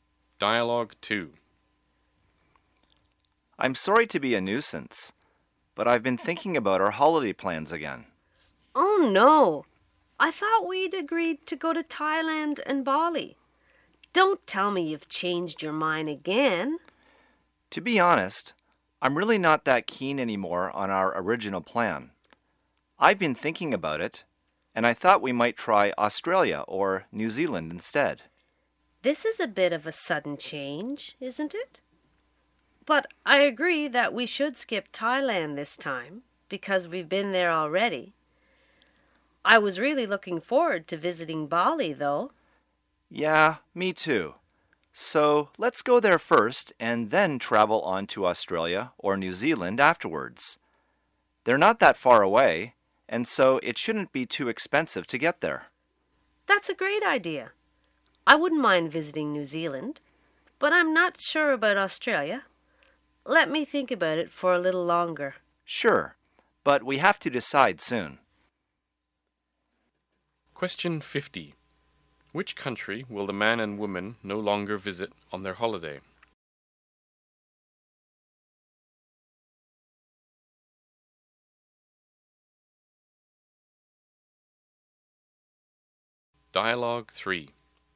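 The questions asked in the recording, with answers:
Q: Which country will the man and woman no longer visit on their holiday?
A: Thailand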